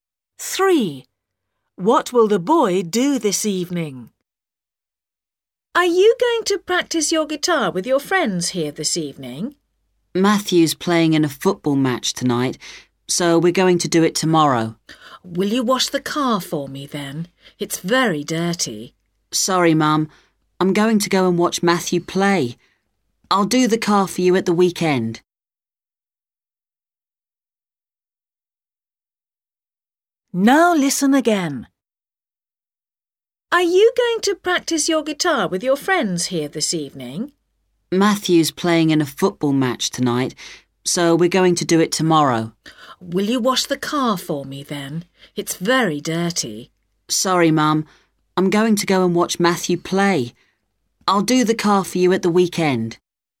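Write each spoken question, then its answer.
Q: What will the boy do this evening?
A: watch Matthew play football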